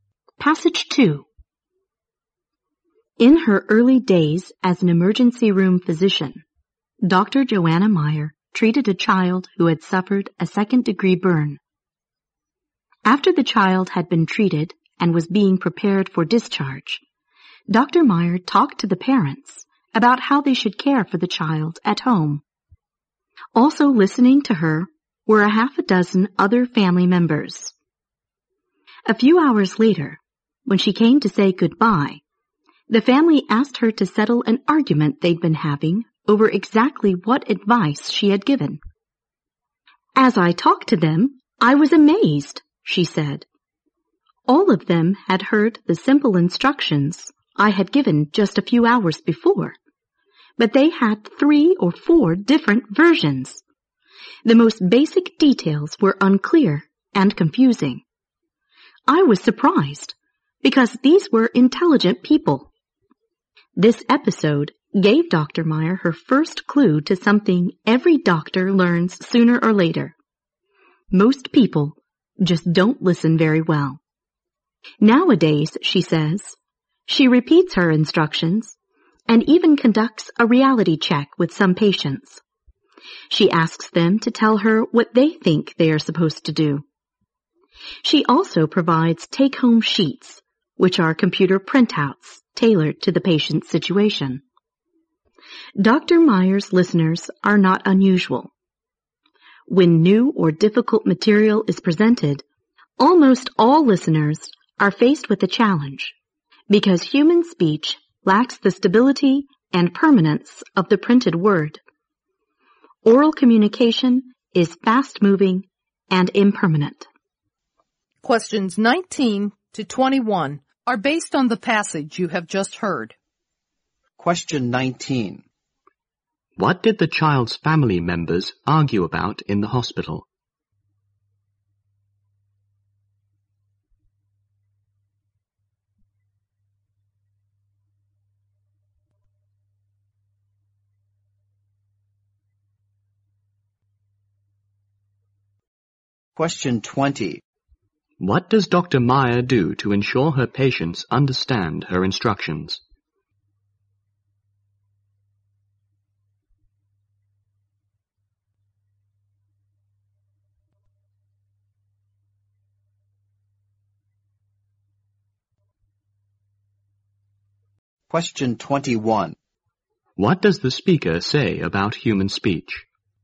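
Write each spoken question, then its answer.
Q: What did the child's family members argue about in the hospital?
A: Exactly what advice the doctor had given.

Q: What does Dr. Meyer do to ensure her patients understand her instructions?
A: She repeats her instructions, asks patients to tell her what they should do, and gives them take-home sheets.

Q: What does the speaker say about human speech?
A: It lacks the stability and permanence of the printed word.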